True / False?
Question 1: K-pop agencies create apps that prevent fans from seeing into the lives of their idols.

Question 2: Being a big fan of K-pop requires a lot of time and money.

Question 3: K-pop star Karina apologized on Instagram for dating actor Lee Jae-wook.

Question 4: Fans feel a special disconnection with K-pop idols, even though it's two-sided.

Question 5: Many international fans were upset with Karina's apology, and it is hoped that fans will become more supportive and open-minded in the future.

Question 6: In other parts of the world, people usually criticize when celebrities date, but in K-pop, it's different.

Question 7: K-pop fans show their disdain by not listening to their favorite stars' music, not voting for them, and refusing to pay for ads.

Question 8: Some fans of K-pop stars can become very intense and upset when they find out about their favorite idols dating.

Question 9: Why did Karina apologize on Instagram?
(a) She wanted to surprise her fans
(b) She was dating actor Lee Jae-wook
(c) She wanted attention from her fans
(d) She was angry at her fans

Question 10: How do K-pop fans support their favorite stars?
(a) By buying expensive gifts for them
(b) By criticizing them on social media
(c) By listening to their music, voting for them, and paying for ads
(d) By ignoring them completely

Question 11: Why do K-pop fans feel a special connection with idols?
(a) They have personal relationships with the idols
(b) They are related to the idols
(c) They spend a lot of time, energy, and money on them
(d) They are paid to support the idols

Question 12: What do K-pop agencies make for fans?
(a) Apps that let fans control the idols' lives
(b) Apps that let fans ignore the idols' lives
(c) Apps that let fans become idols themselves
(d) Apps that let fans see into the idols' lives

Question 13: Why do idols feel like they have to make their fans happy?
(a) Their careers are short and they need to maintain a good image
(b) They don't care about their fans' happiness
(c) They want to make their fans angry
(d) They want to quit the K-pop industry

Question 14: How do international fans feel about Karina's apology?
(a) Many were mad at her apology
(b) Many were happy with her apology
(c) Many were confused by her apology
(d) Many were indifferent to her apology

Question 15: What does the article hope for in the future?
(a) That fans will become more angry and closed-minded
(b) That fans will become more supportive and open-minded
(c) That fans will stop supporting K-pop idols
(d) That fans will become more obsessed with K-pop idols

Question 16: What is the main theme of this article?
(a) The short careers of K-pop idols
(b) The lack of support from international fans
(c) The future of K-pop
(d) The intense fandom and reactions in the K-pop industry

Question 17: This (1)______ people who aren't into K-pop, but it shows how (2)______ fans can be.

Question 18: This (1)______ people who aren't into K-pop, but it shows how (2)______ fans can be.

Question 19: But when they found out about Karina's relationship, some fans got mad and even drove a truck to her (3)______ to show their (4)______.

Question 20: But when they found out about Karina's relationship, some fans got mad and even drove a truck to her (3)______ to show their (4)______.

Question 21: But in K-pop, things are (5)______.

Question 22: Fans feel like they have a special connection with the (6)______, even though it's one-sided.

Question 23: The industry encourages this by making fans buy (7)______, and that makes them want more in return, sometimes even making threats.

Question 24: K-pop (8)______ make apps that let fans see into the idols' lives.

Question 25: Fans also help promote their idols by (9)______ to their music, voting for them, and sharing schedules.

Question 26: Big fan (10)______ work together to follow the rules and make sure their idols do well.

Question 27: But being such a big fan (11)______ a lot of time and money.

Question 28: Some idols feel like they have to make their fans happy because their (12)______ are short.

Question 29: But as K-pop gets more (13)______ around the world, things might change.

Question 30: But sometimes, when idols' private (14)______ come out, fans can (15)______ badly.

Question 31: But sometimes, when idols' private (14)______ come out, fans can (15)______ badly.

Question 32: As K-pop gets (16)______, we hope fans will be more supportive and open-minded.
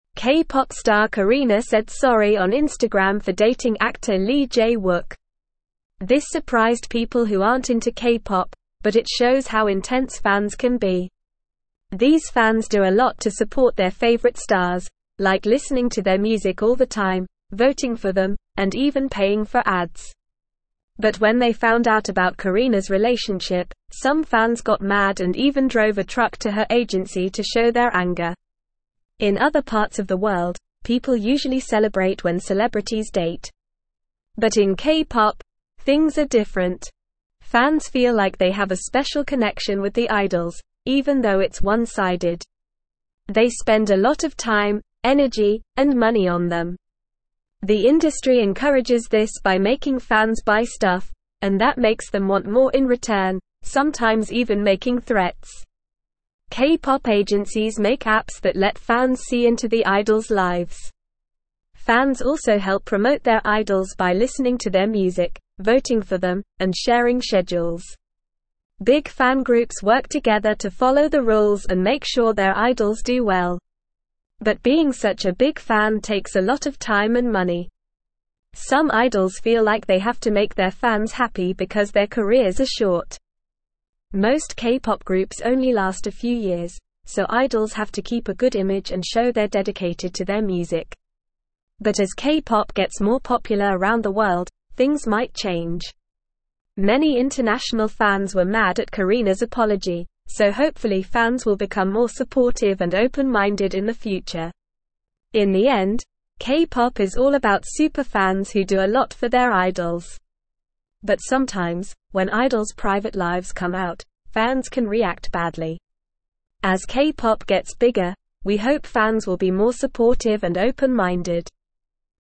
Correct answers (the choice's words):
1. False
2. True
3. True
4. False
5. True
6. False
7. False
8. True
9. She was dating actor Lee Jae-wook
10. By listening to their music, voting for them, and paying for ads
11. They spend a lot of time, energy, and money on them
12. Apps that let fans see into the idols' lives
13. Their careers are short and they need to maintain a good image
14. Many were mad at her apology
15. That fans will become more supportive and open-minded
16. The intense fandom and reactions in the K-pop industry
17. surprised
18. intense
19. agency
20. anger
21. different
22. idols
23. stuff
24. agencies
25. listening
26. groups
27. takes
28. careers
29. popular
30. lives
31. react
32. bigger

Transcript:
K-pop star Karina said sorry on Instagram for dating actor Lee Jae-wook. This surprised people who aren't into K-pop, but it shows how intense fans can be. These fans do a lot to support their favorite stars, like listening to their music all the time, voting for them, and even paying for ads. But when they found out about Karina's relationship, some fans got mad and even drove a truck to her agency to show their anger.
In other parts of the world, people usually celebrate when celebrities date. But in K-pop, things are different. Fans feel like they have a special connection with the idols, even though it's one-sided. The industry encourages this by making fans buy stuff, and that makes them want more in return, sometimes even making threats.
K-pop agencies make apps that let fans see into the idols' lives. Fans also help promote their idols by listening to their music, voting for them, and sharing schedules. Big fan groups work together to follow the rules and make sure their idols do well. But being such a big fan takes a lot of time and money.
Some idols feel like they have to make their fans happy because their careers are short. Most K-pop groups only last a few years, so idols have to keep a good image and show they're dedicated to their music. But as K-pop gets more popular around the world, things might change. Many international fans were mad at Karina's apology, so hopefully fans will become more supportive and open-minded in the future.
In the end, K-pop is all about super fans who do a lot for their idols. But sometimes, when idols' private lives come out, fans can react badly. As K-pop gets bigger, we hope fans will be more supportive and open-minded.

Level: Level 3